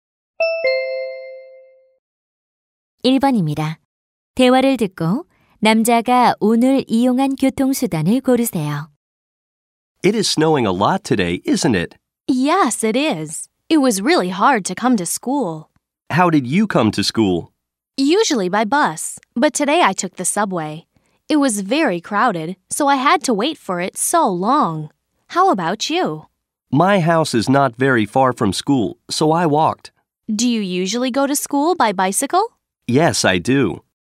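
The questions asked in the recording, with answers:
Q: 대화를 듣고 남자가 오늘 이용한 교통수단을 고르세요.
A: 지하철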